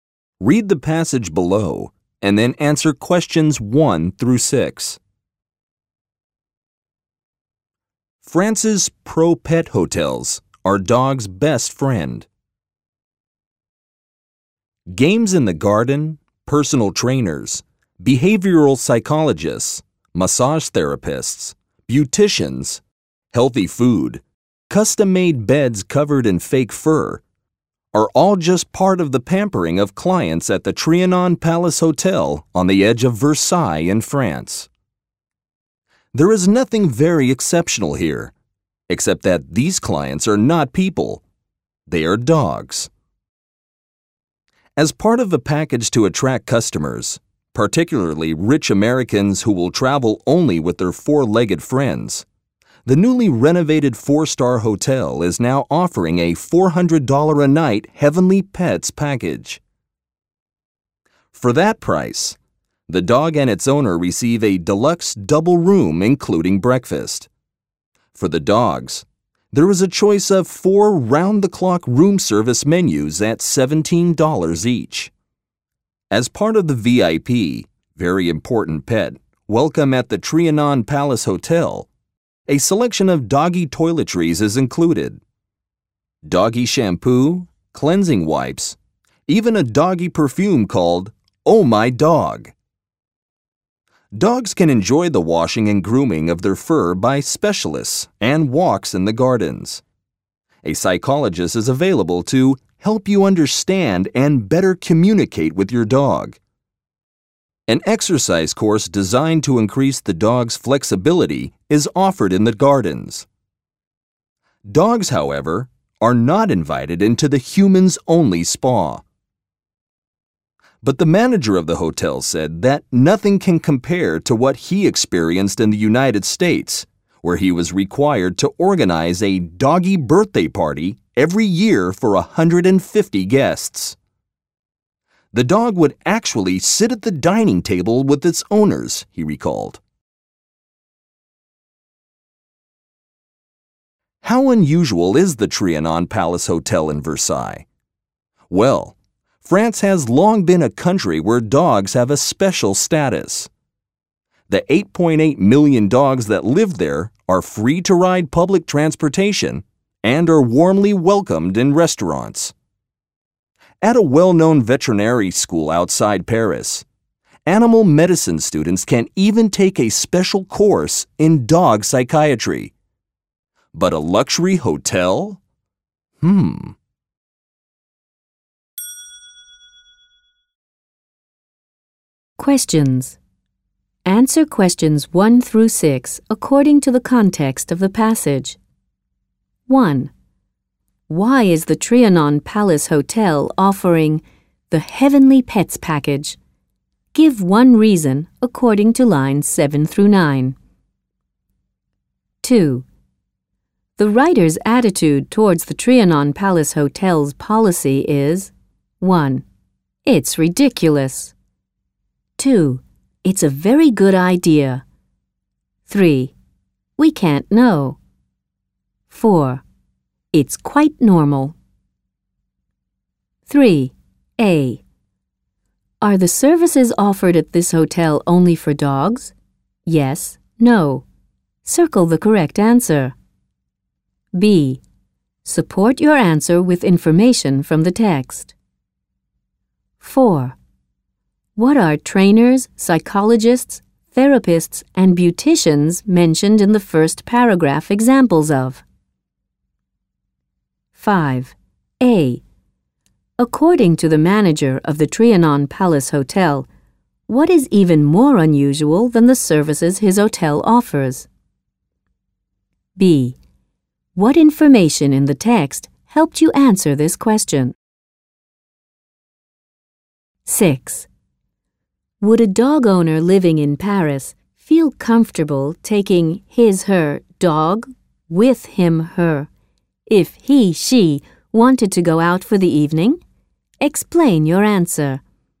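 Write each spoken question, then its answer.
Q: Why is the Trianon Palace Hotel offering the Heavenly Pets package?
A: To attract customers, especially rich Americans who travel only with their dogs

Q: A. Are the services offered at this hotel only for dogs?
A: No; the owner also gets a deluxe double room with breakfast

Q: What are trainers, psychologists, therapists, and beauticians mentioned in the first paragraph examples of?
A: The pampering of the hotel's dog clients

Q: A. According to the manager of the Trianon Palace Hotel, what is even more unusual than the services his hotel offers?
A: A yearly doggy birthday party for 150 guests in the US, with the dog sitting at the dining table

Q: Would a dog owner living in Paris feel comfortable taking his/her dog with him/her if he/she wanted to go out for the evening?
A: Yes; dogs can ride public transportation and are warmly welcomed in restaurants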